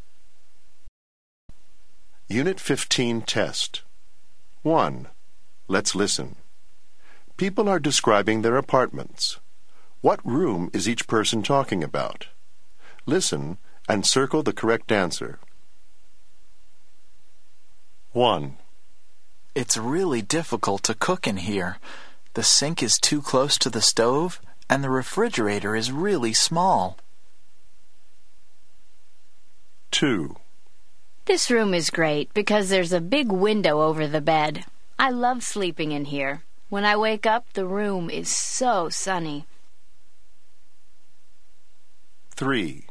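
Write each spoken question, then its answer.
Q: What room is each person talking about?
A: the kitchen

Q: What room is each person talking about?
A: the bedroom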